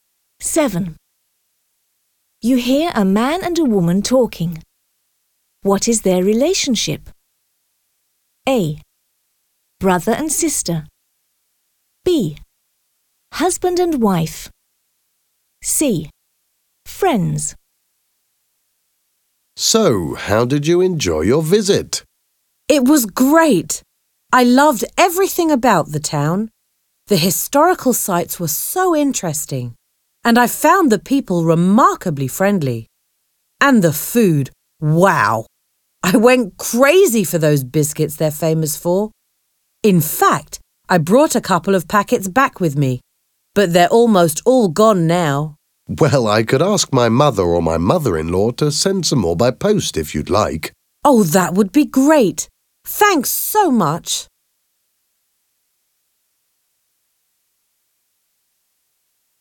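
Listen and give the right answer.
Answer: C: Friends.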